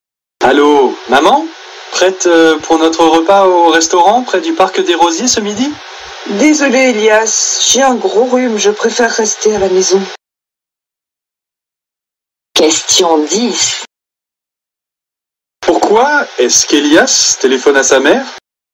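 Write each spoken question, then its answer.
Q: Pourquoi est-ce qu'Elias téléphone à sa mère ?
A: Pour confirmer leur repas au restaurant ce midi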